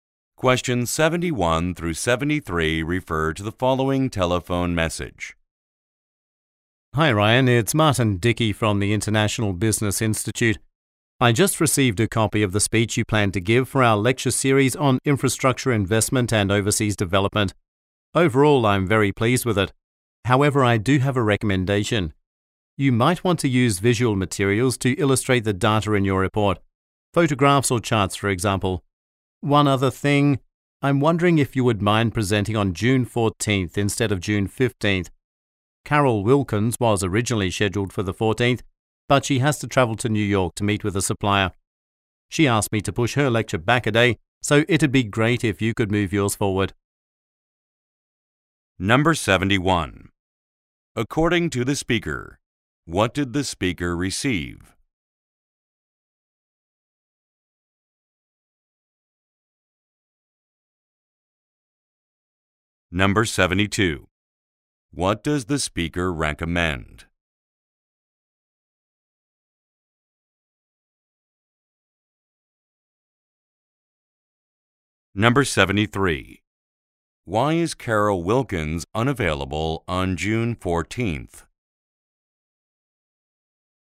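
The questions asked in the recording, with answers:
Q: According to the speaker, what did the speaker receive?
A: A copy of Ryan's speech

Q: What does the speaker recommend?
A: Using visual materials such as photographs or charts

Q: Why is Carol Wilkins unavailable on June 14th?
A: She has to travel to New York to meet a supplier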